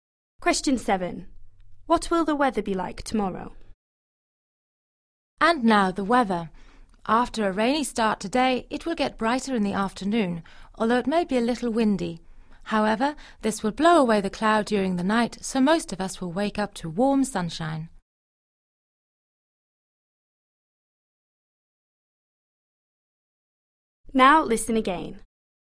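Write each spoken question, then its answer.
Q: What will the weather be like tomorrow?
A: Warm and sunny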